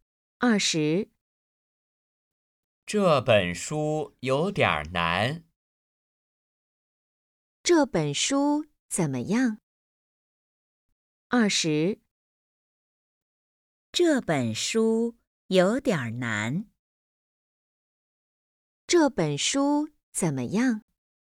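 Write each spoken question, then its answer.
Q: 这本书怎么样?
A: 有点难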